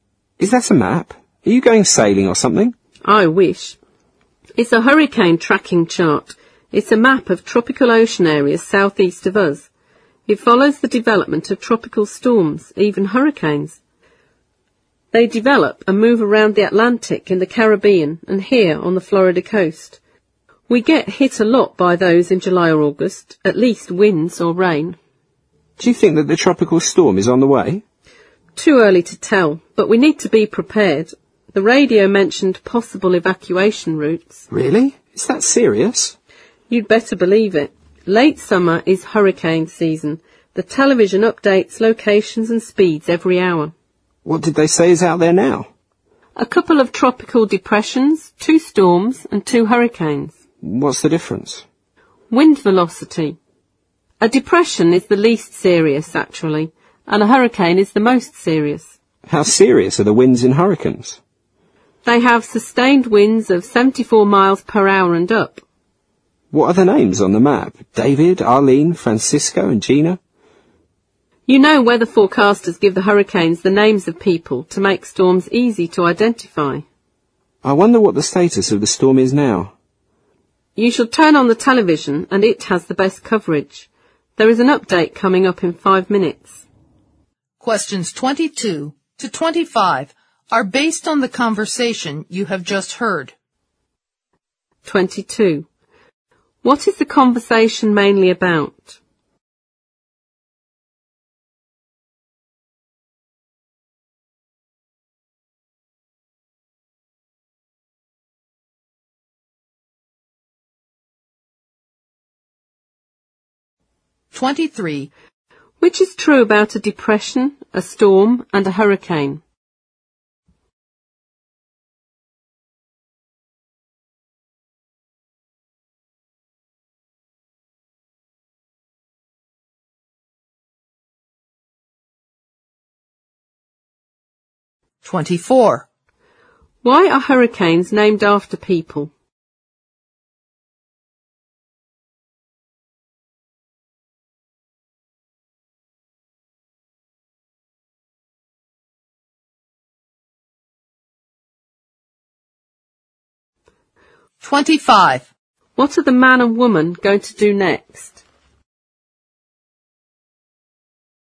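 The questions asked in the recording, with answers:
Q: What is the conversation mainly about?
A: Tracking tropical storms and hurricanes

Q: Which is true about a depression, a storm, and a hurricane?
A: They differ in wind velocity; a depression is least serious and a hurricane most serious

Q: Why are hurricanes named after people?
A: To make storms easy to identify

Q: What are the man and woman going to do next?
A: Turn on the television to watch the storm update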